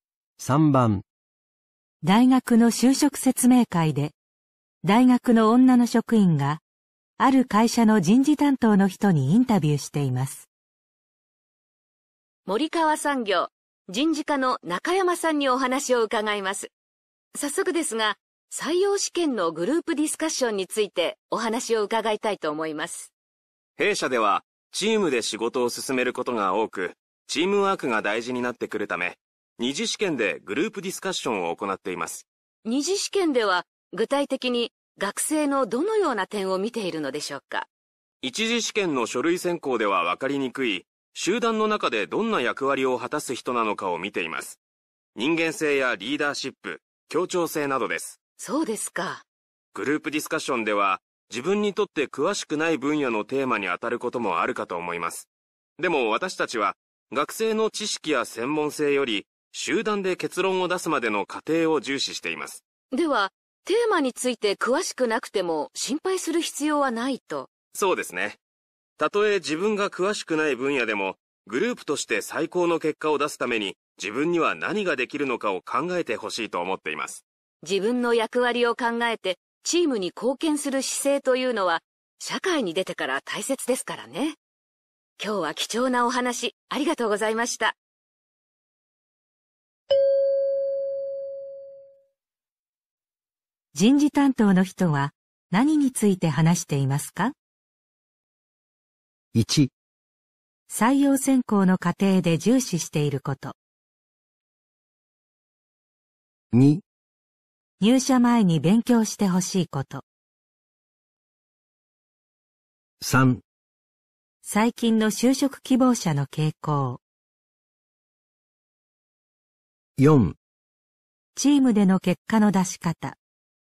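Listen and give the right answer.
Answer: 1: 採用選考の過程で重視していること。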